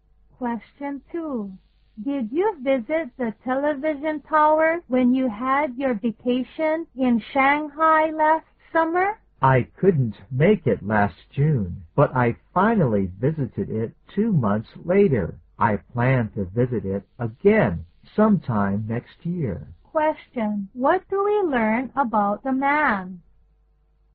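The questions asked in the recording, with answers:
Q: What do we learn about the man?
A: He visited the television tower in Shanghai last August and plans to visit it again next year.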